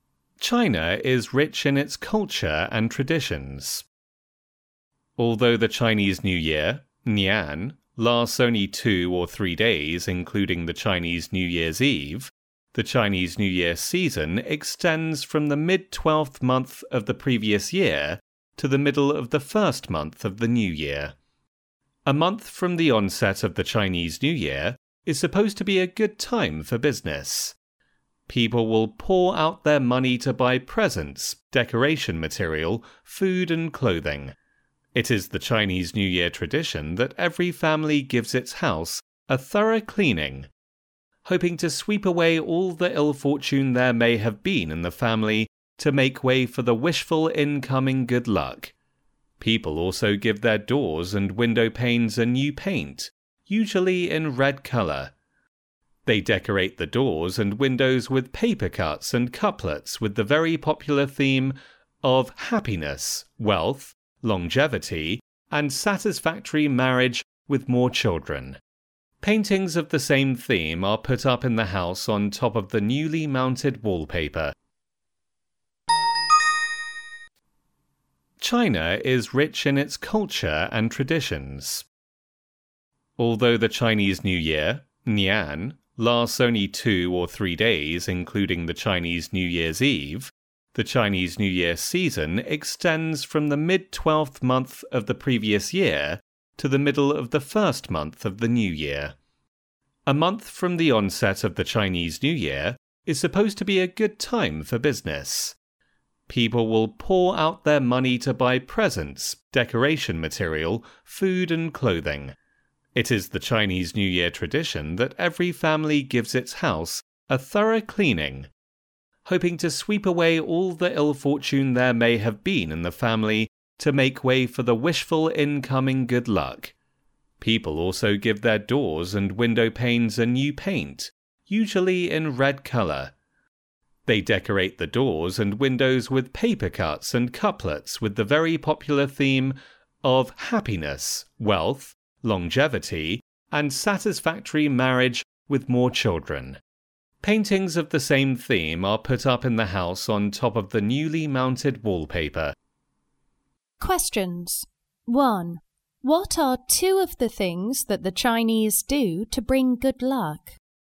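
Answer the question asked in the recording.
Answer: They give the house a thorough cleaning to sweep away ill fortune, and they paint doors and windows red and decorate them with paper cuts and couplets.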